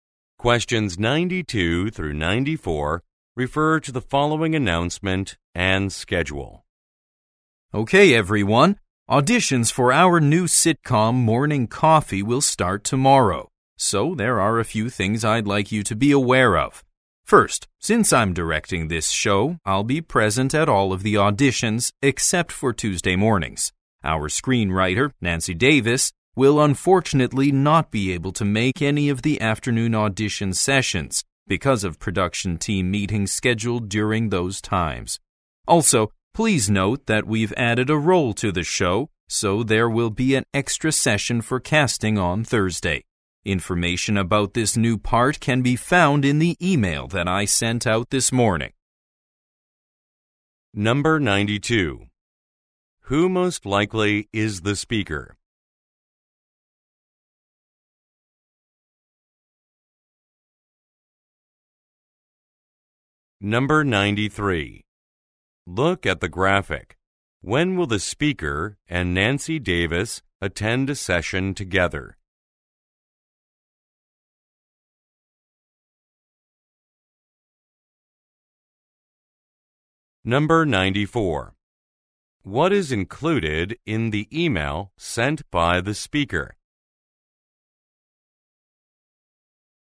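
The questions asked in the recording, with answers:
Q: Who most likely is the speaker?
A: A director

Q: What is included in the email sent by the speaker?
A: Information about a new role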